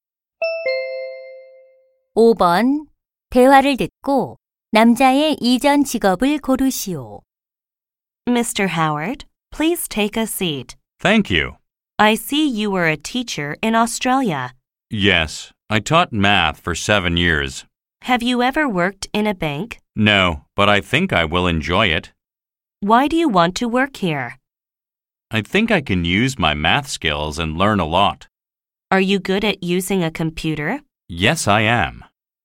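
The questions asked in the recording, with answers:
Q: 대화를 듣고 남자의 이전 직업을 고르시오.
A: 수학 교사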